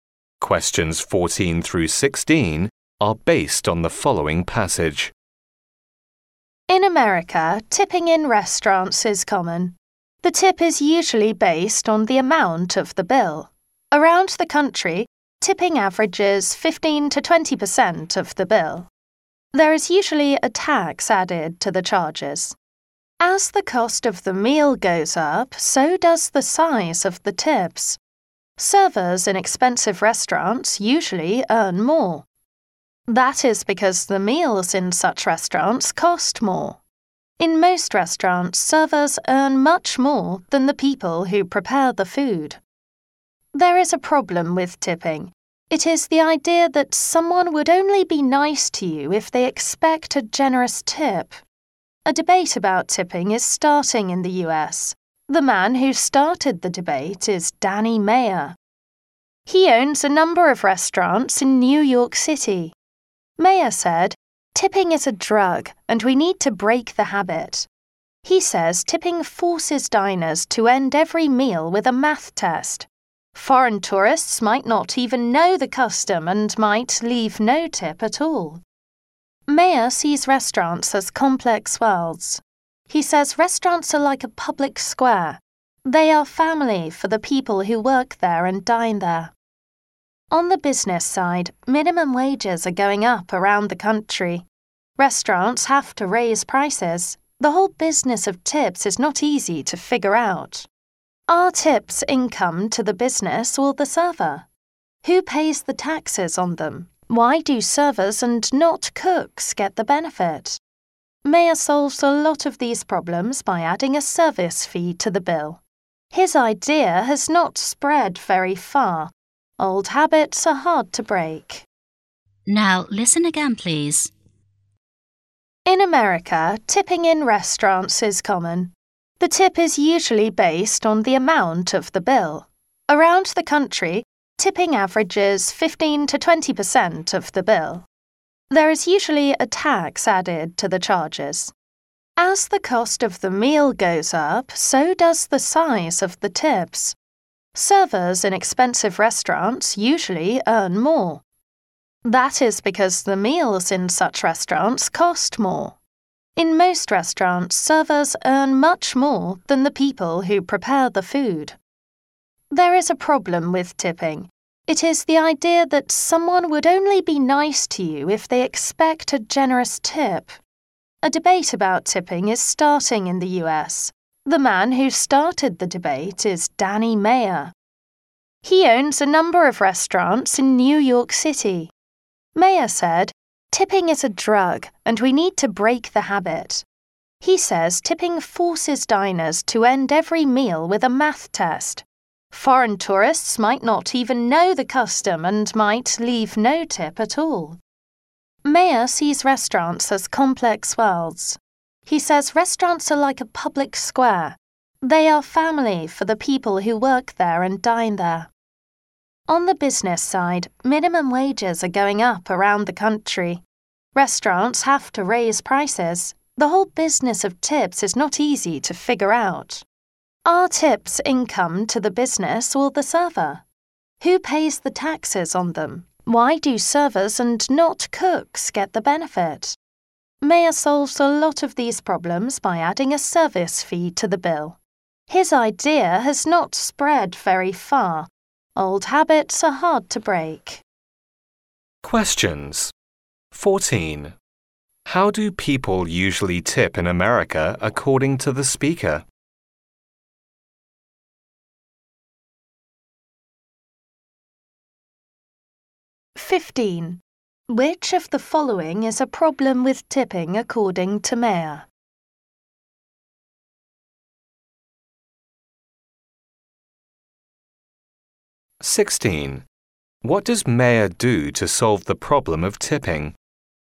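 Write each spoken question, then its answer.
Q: How do people usually tip in America according to the speaker?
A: 15 to 20% of the bill

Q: What does Mayer do to solve the problem of tipping?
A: Adds a service fee to the bill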